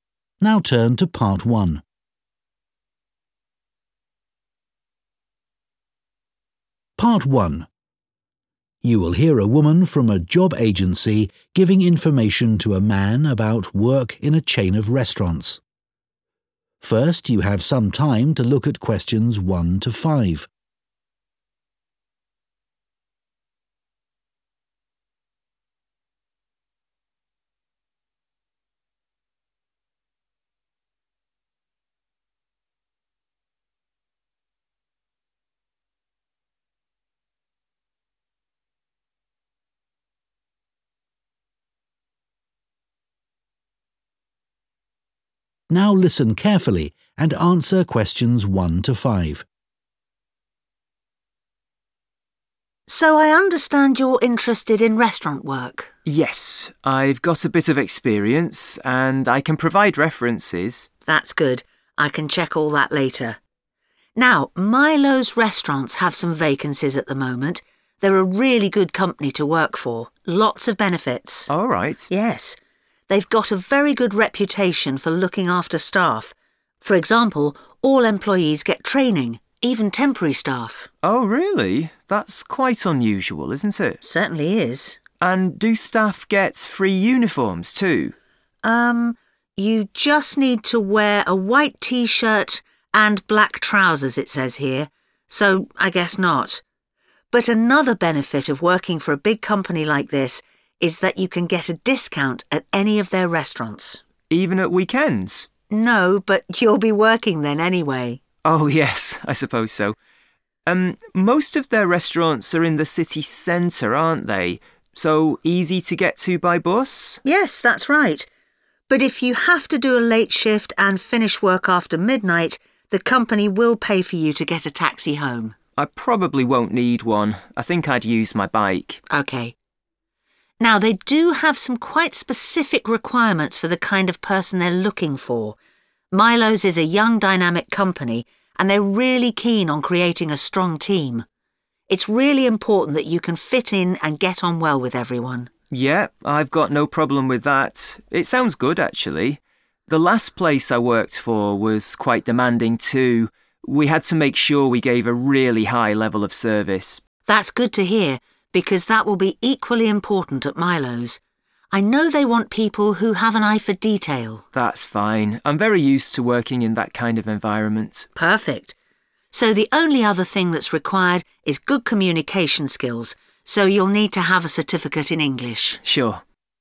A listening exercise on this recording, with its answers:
Questions 1-5. Complete the notes below. Write ONE WORD ONLY for each answer.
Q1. provided for all staff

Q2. during weekdays at all Milo's Restaurants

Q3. provided after midnight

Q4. must care about maintaining a high standard of 4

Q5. must have a qualification in 5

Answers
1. training
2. discount
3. taxi
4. service
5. English

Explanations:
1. all employees (= all staff) get training [tất cả các nhân viên đều được đào tạo] – even temporary staff.
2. No (= during weekdays) [Không đâu], but you'll be working then anyway.
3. But if you have to do a late shift and finish work after midnight, the company will pay for you to get a taxi home [Nhưng nếu bạn phải làm ca muộn và xong việc sau nửa đêm, công ty sẽ trả tiền taxi cho bạn về nhà].
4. We had to make sure we gave a really high level (= high standard) of service [Chúng tôi phải đảm bảo cung cấp dịch vụ chất lượng cao].
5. so you'll need to have a certificate (= qualification) in English [vì vậy bạn sẽ cần phải có chứng chỉ tiếng Anh].

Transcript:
WOMAN: So, I understand you're interested in restaurant work?
MAN: Yes. I've got a bit of experience and I can provide references.
WOMAN: That's good. I can check all that later. Now, Milo's Restaurants have some vacancies at the moment. They're a really good company to work for. Lots of benefits.
MAN: Oh right.
WOMAN: Yes. They've got a very good reputation for looking after staff.
MAN: Oh really? That's quite unusual, isn't it?
WOMAN: Certainly is.
MAN: And do staff get free uniforms too?
you just need to wear a white T-shirt and black trousers, it says here. So I guess not... But another benefit of working for a big company like this is that (Q2) you can get a discount at any of their restaurants.
WOMAN: No (= during weekdays) [Không đâu], but you'll be working then anyway.
MAN: Oh yes. I suppose so. Most of their restaurants are in the city centre, aren't they? So, easy to get to by bus?
WOMAN: Yes. That's right.
MAN: I probably won't need one. I think I'd use my bike.
WOMAN: OK. Now, they do have some quite specific requirements for the kind of person they're looking for. Milo's is a young, dynamic company and they're really keen on creating a strong team. It's really important that you can fit in and get on well with everyone.
MAN: Yeah. I've got no problem with that. It sounds good, actually. The last place I worked for was quite demanding too.
WOMAN: That's good to hear because that will be equally important at Milo's. I know they want people who have an eye for detail.
MAN: That's fine. I'm very used to working in that kind of environment.
WOMAN: Perfect.